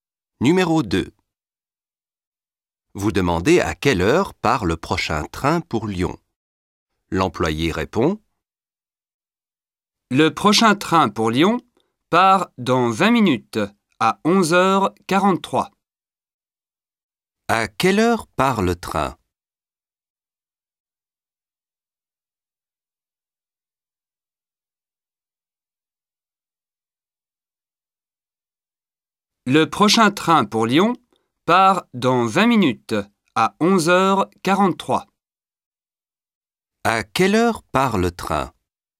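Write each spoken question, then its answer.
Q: À quelle heure part le train?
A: À 11h43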